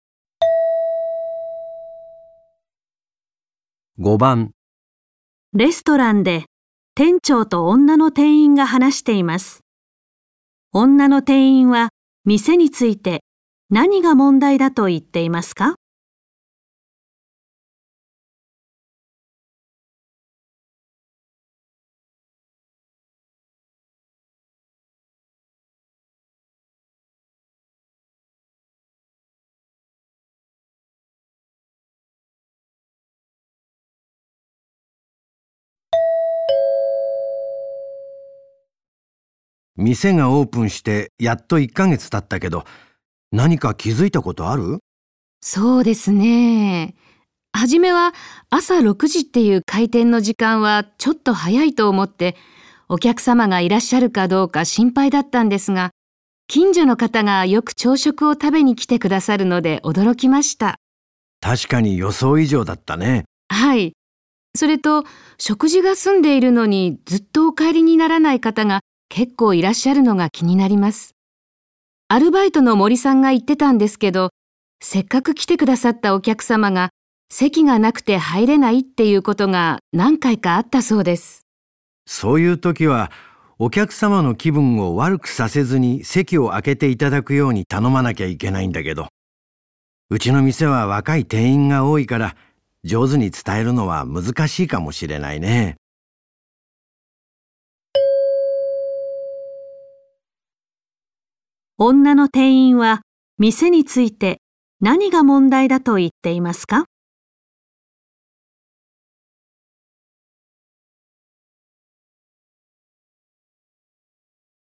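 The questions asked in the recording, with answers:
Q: 女の店員は店について何が問題だと言っていますか?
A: 食事が済んでも長く帰らない客がいて、他の客が入れないこと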